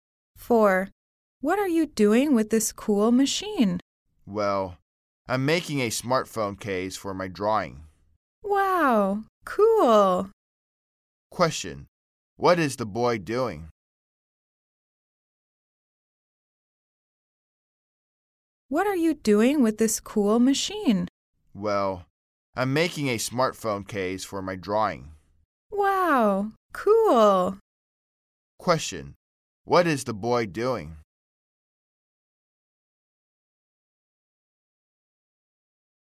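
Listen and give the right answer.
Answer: Making a smartphone case for his drawing.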